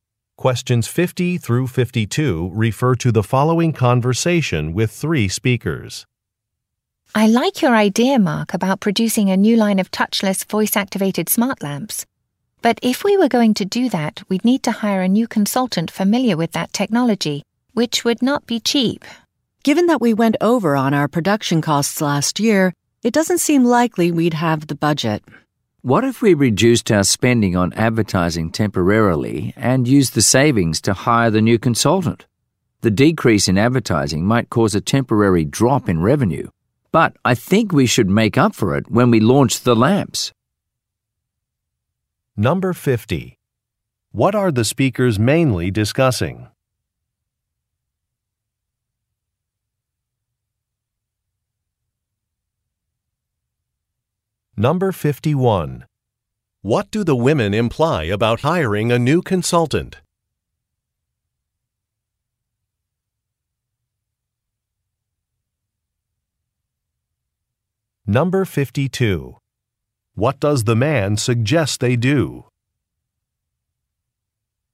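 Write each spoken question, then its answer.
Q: What are the speakers mainly discussing?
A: A new line of smart lamps

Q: What do the women imply about hiring a new consultant?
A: It would be expensive / not in the budget

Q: What does the man suggest they do?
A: Temporarily cut advertising spending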